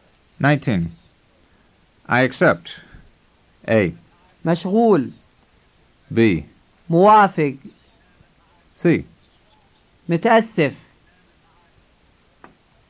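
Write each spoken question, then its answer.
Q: I accept.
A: B: موافق.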